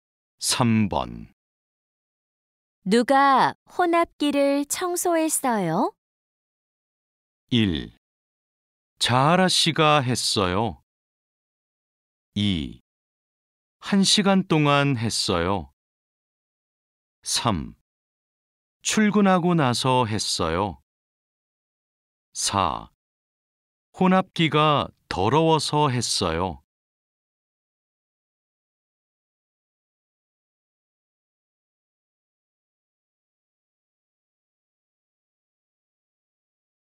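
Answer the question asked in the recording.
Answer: 1: 자하라 씨가 했어요.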